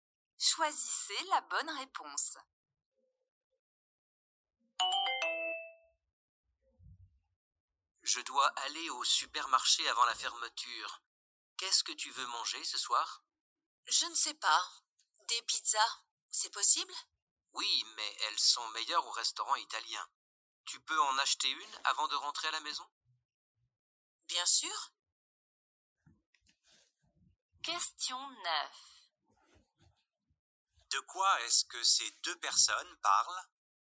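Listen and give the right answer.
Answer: Du repas de ce soir (acheter une pizza)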